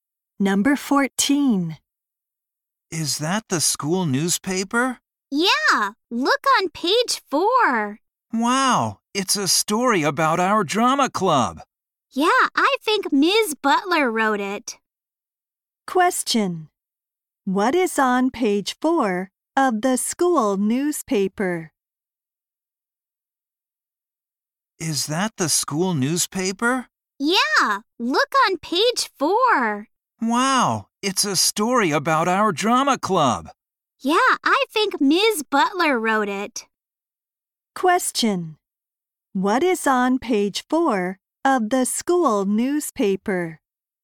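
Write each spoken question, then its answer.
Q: What is on page 4 of the school newspaper?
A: A story about the drama club.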